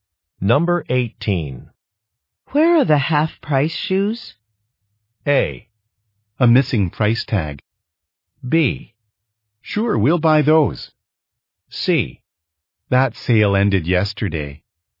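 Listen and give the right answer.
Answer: C: That sale ended yesterday.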